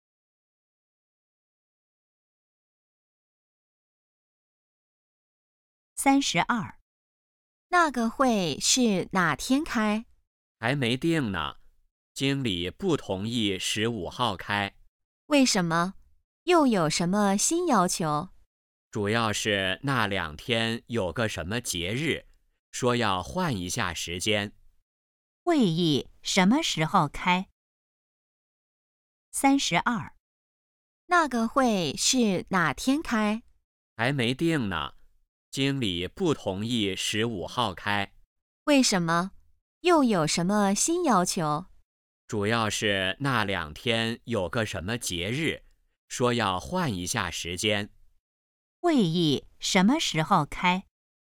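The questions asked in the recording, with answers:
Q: 会议什么时候开?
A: 还没定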